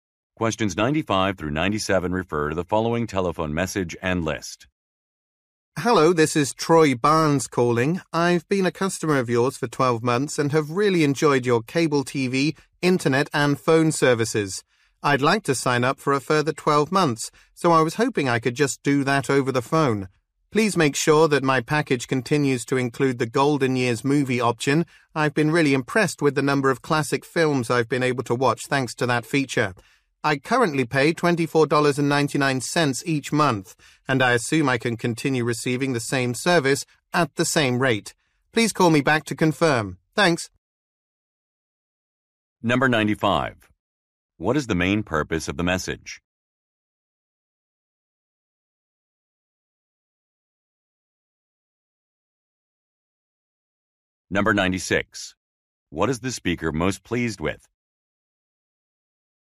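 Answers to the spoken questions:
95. To renew a service contract
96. The classic movie option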